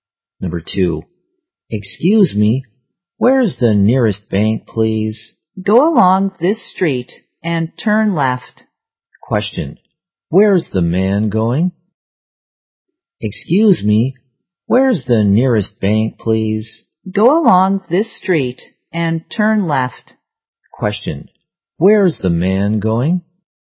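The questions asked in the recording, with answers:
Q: Where's the man going?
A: To the nearest bank.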